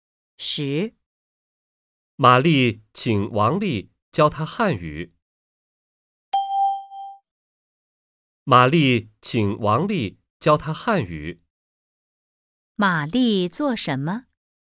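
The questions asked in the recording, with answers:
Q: 玛丽做什么?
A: 请王丽教她汉语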